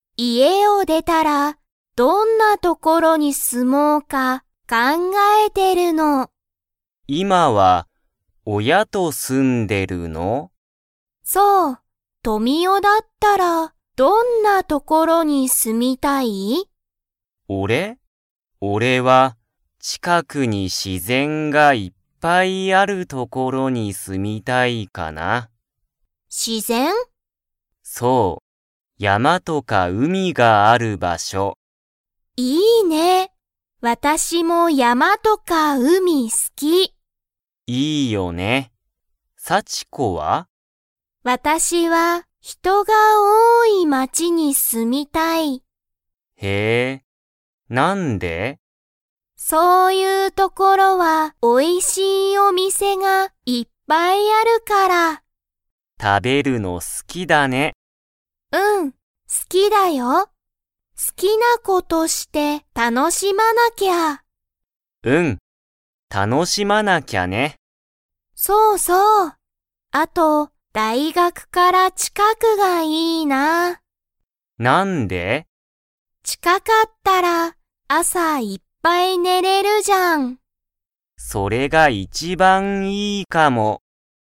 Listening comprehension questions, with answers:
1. 富男とみおは、どんな所ところに住すみたいですか?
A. 山やまと海うみがない所ところ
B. 自然しぜんがいっぱいある所ところ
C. 人ひとが多おおい街まち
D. おいしいお店みせがある所ところ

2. 幸子さちこは、食たべるのが 。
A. 好すきだ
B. 好すきじゃない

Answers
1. B
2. A

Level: Level 2

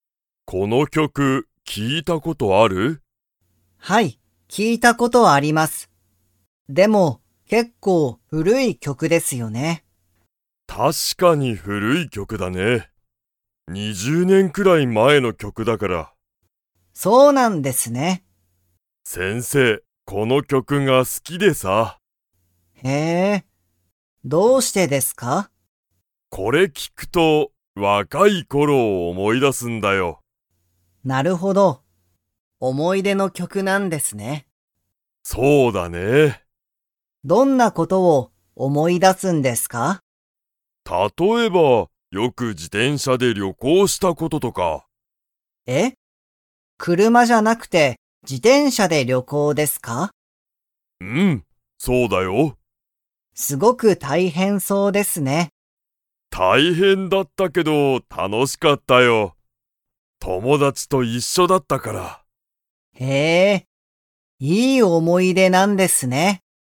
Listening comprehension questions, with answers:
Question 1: タカシは、この曲きょくを聴きいたことが 。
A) ある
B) ない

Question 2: 先生せんせいは、若わかい時とき何なにで旅行りょこうしましたか?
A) バス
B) 車くるま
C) 自転車じてんしゃ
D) 電車でんしゃ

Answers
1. A
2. C

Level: Level 3

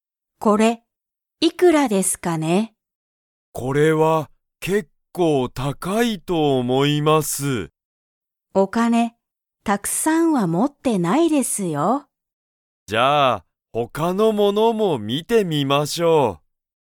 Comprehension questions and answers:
Comprehension Quiz (Skip if you don't understand the conversation yet)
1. 田中(たなか)さんはお金(かね)をたくさん持(も)って____。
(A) いる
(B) いない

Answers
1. B

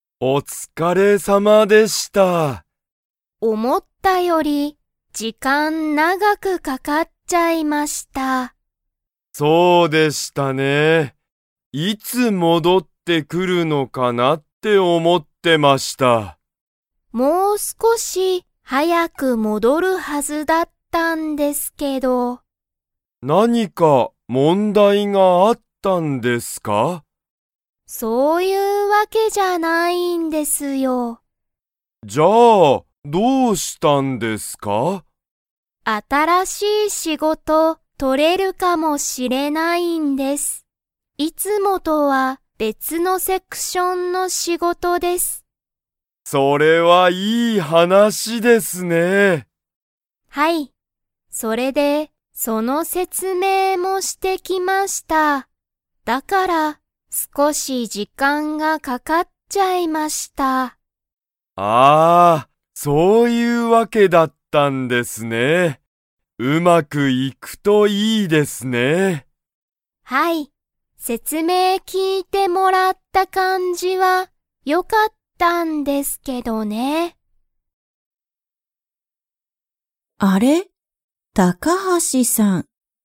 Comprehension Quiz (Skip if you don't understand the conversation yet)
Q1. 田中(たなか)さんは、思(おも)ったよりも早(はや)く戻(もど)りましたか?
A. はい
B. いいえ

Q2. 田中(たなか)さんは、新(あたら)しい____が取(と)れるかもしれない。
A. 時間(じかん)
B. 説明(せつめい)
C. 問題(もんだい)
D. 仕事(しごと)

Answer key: 1B, 2D

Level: Level 2

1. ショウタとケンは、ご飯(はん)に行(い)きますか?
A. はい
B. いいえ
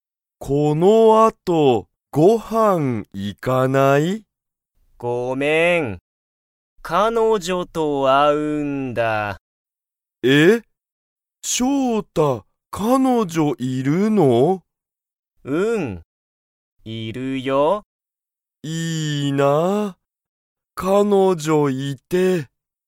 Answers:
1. B

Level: Level 1

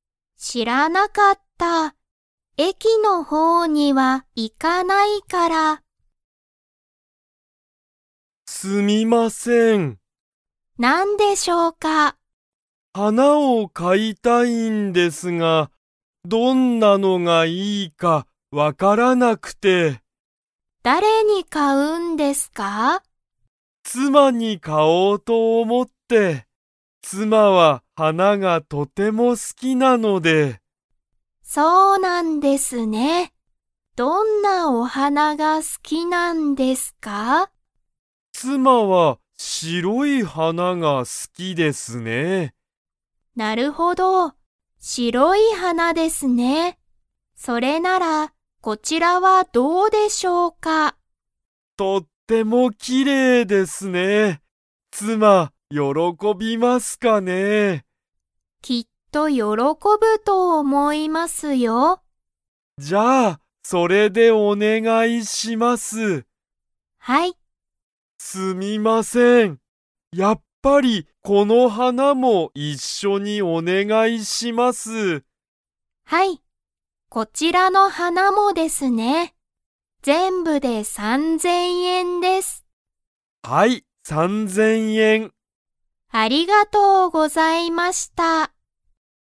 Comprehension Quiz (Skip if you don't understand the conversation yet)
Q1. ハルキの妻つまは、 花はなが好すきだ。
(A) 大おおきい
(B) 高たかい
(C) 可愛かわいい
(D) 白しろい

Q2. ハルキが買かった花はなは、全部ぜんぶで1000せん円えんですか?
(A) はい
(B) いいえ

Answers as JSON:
{"1": "D", "2": "B"}

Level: Level 3

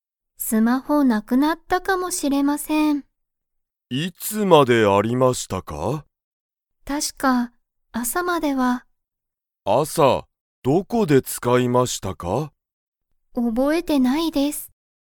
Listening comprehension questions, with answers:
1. スマホは、____まであった。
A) 毎日(まいにち)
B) 朝(あさ)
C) 最近(さいきん)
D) 普通(ふつう)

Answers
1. B

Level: Level 1

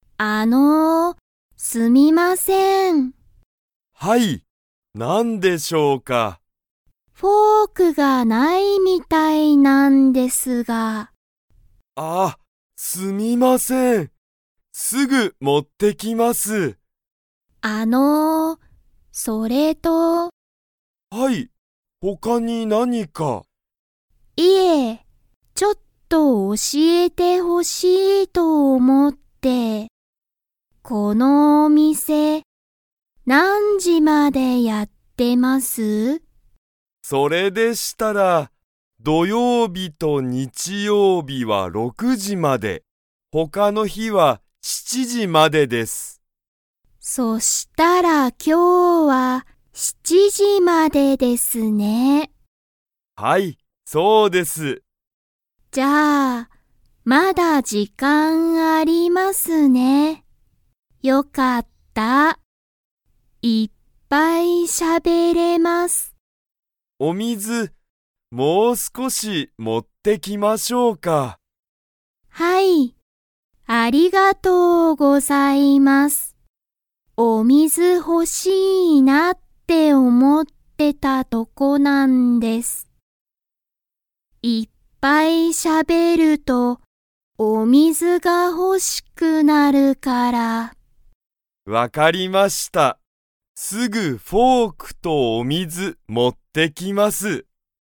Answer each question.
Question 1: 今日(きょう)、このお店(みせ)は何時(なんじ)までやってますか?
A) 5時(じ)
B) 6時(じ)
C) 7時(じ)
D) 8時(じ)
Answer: C

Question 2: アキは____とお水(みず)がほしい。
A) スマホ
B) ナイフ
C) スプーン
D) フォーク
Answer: D

